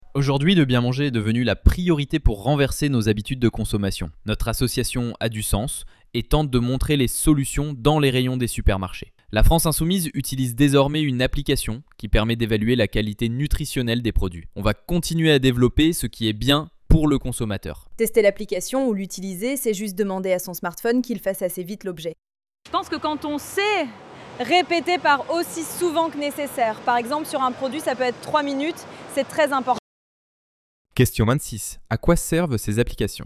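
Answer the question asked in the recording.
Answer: À évaluer la qualité nutritionnelle des produits.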